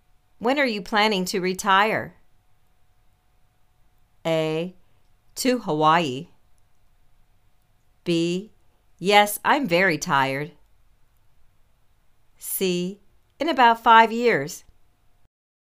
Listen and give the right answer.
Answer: In about five years